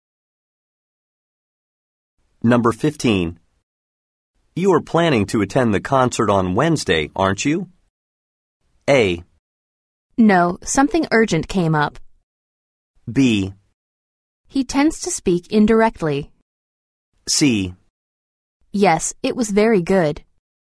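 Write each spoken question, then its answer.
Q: You are planning to attend the concert on Wednesday, aren't you?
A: A: No, something urgent came up.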